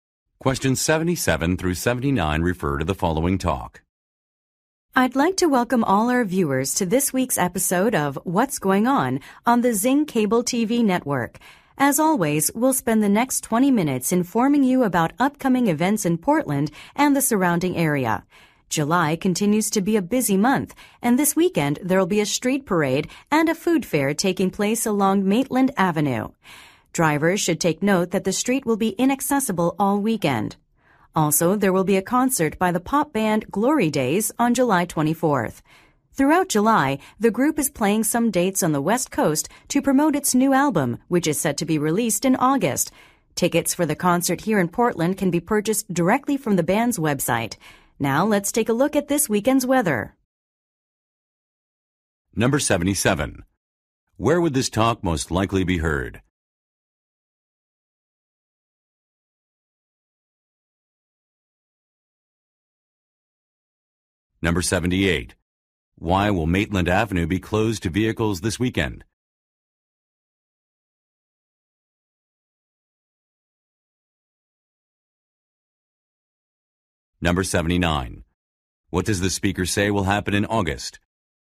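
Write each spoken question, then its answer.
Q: Where would this talk most likely be heard?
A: On a TV program

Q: Why will Maitland Avenue be closed to vehicles this weekend?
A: For a street parade and food fair

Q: What does the speaker say will happen in August?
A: Glory Days will release a new album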